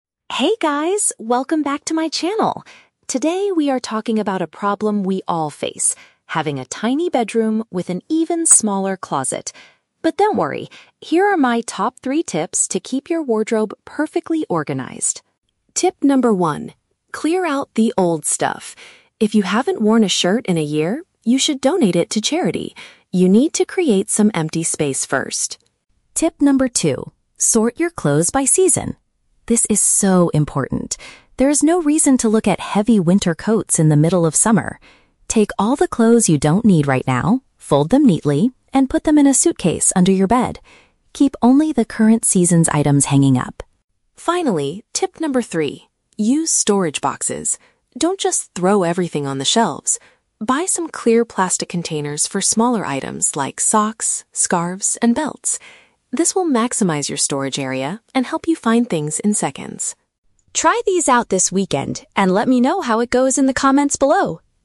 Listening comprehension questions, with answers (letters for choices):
Listen to the vlog about organizing a bedroom closet. Choose the correct answer (A, B, or C) for each question.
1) What does the vlogger recommend doing with clothes you no longer wear?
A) Giving them away to help other people.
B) Throwing them into the recycling bin.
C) Selling them online to make extra money.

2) According to the second tip, what should viewers do with out-of-season garments?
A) Hang them at the very back of the wardrobe.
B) Place them inside luggage beneath the sleeping area.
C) Move them into a different room of the house.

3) Why does the vlogger suggest using clear plastic containers?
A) Because they protect expensive clothes from dust and insects.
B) To make the best use of the available space for tiny accessories.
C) Because they are much cheaper than buying new wooden shelves.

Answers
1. A
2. B
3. B

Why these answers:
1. The vlogger says, "If you haven't worn a shirt in a year, you should donate it to charity." "Giving them away to help other people" is the exact meaning of donating to charity. Why the traps are wrong: Options B and C are very common real-world ways to get rid of old clothes, but the vlogger specifically mentions charity, not recycling or selling.
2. The vlogger instructs listeners to "put them in a suitcase under your bed." Option B perfectly paraphrases this: "luggage" (suitcase) and "beneath the sleeping area" (under your bed). Why the traps are wrong: Options A and C are plausible ways to organize a room, but they are not the advice given in the audio.
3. The vlogger says containers are for "smaller items like socks, scarves, and belts" (tiny accessories) and that this will "maximize your storage area" (make the best use of the available space). Why the traps are wrong: Option A is a trap; plastic containers do protect clothes, but the vlogger focuses on saving space and finding things quickly, not on dust/insects. Option C is a trap; shelves are mentioned ("Don't just throw everything on the shelves"), but there is no price comparison.

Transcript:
Vlogger: Hey guys, welcome back to my channel! Today, we are talking about a problem we all face: having a tiny bedroom with an even smaller closet. But don't worry, here are my top three tips to keep your wardrobe perfectly organized.
Tip number one: clear out the old stuff. If you haven't worn a shirt in a year, you should donate it to charity. You need to create some empty space first.
Tip number two: sort your clothes by season. This is so important! There is no reason to look at heavy winter coats in the middle of summer. Take all the clothes you don't need right now, fold them neatly, and put them in a suitcase under your bed. Keep only the current season's items hanging up.
Finally, tip number three: use storage boxes. Don't just throw everything on the shelves. Buy some clear plastic containers for smaller items like socks, scarves, and belts. This will maximize your storage area and help you find things in seconds.
Try these out this weekend, and let me know how it goes in the comments below!